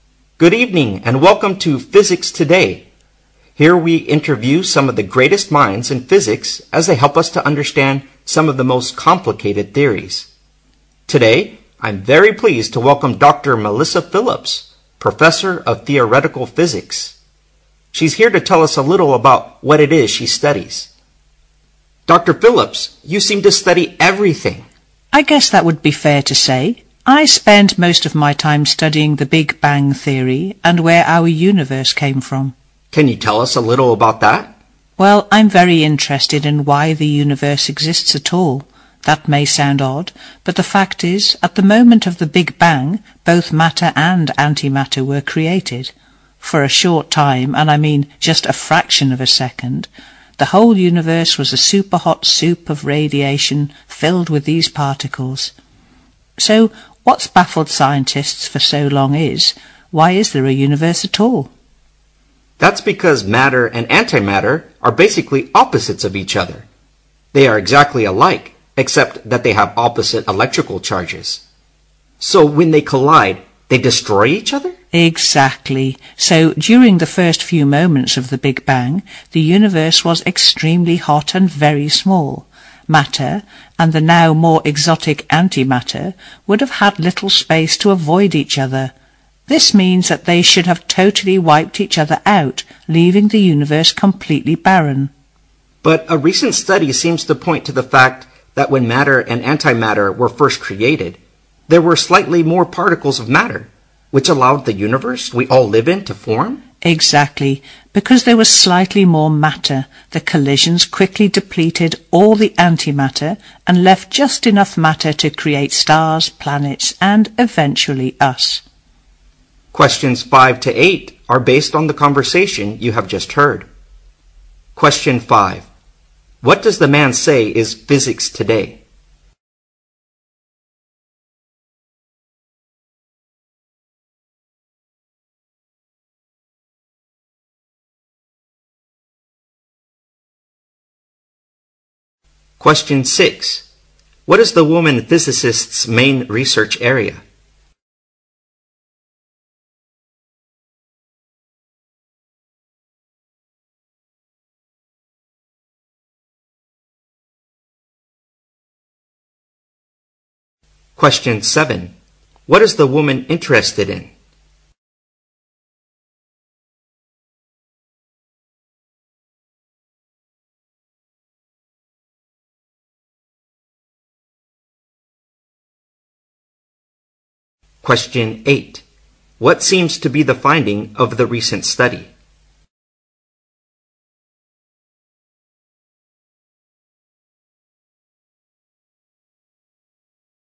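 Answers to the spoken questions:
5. A program that interviews great physicists who help explain complicated theories
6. The Big Bang Theory and where the universe came from
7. Why the universe exists at all
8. There were slightly more particles of matter than antimatter when they were first created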